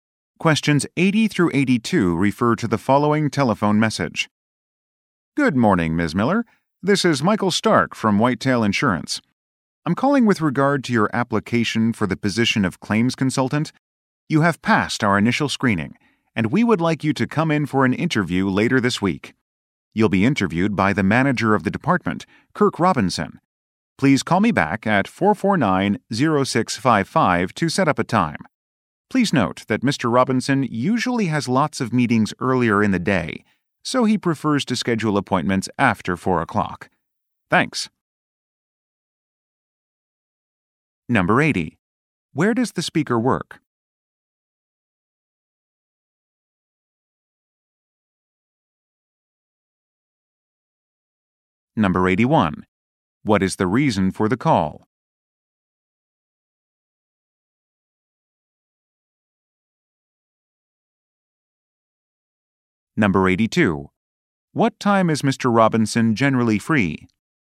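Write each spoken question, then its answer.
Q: Where does the speaker work?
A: At an insurance company

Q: What is the reason for the call?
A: To arrange a job interview

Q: What time is Mr. Robinson generally free?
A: After 4 o'clock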